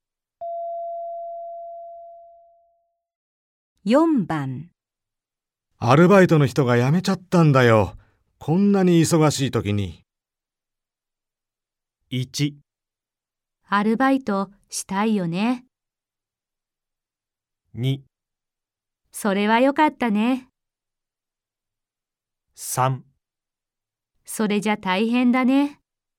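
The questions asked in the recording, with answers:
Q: アルバイトの人が辞めちゃったんだよ。こんなに忙しい時に。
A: 3: それじゃ大変だね。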